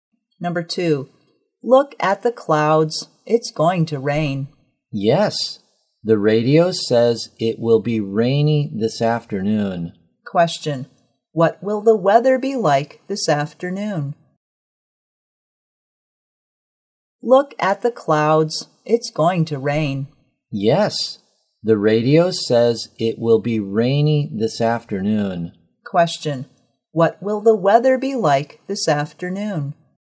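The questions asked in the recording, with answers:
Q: Question, what will the weather be like this afternoon?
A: Rainy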